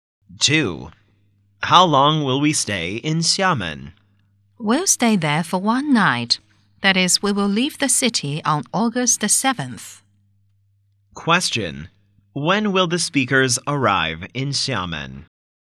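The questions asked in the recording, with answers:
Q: When will the speakers arrive in Xiamen?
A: On August the 6th.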